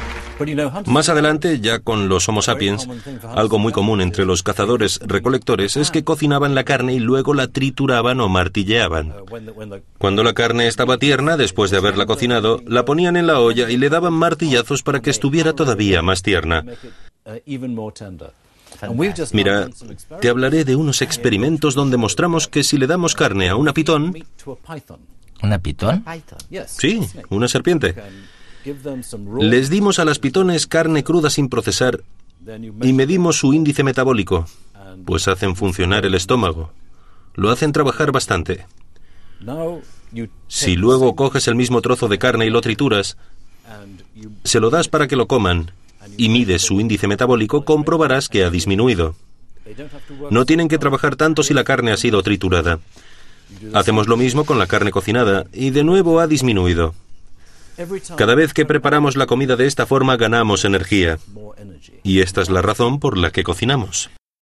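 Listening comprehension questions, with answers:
Escucha la última parte del reportaje e intenta resumirla.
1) Según los científicos, ¿por qué el ser humano se puso a cocinar?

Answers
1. Porque la carne cocinada (o triturada) cuesta menos digerir, así ganamos energía.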